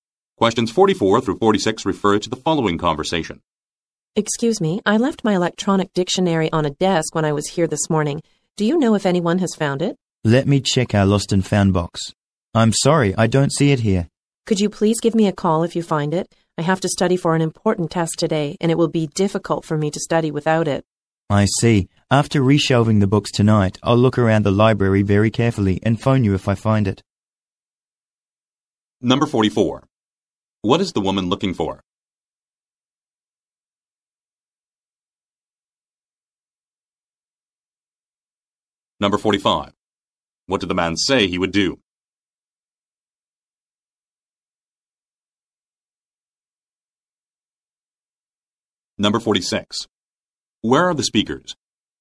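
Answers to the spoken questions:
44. Her electronic dictionary
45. Look around the library and phone her if he finds it
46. In a library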